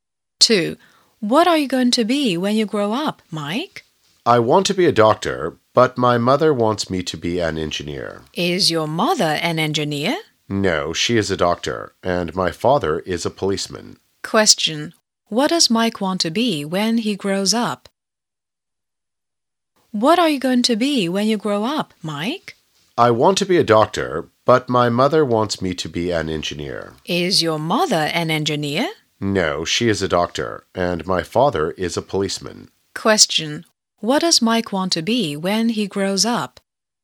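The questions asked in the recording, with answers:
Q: What does Mike want to be when he grows up?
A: A doctor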